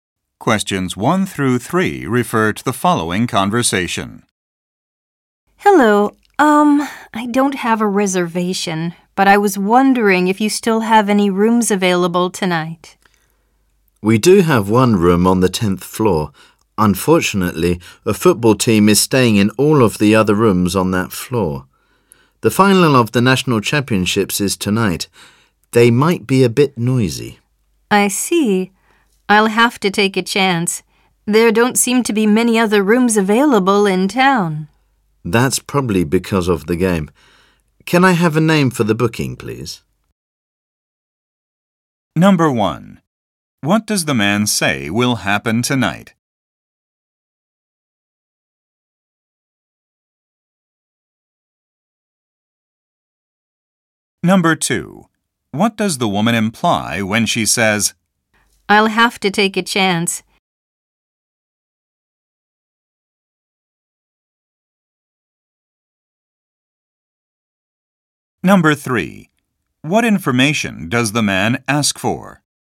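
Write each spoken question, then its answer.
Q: What does the man say will happen tonight?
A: The final of the national championships will take place.

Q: What does the woman imply when she says,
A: She will take the room even though it may be noisy.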